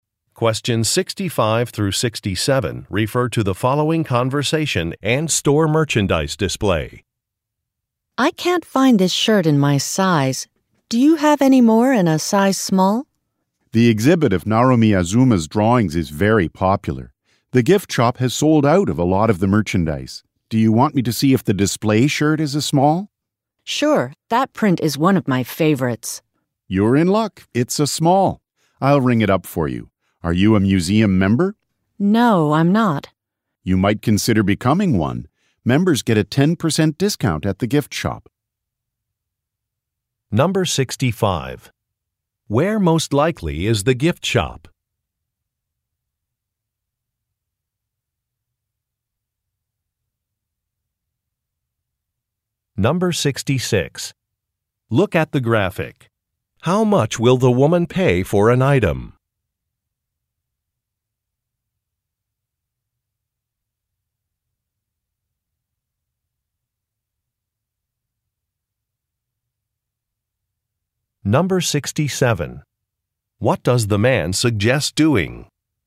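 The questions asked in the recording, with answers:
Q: Where most likely is the gift shop?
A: In a museum

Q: What does the man suggest doing?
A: Becoming a museum member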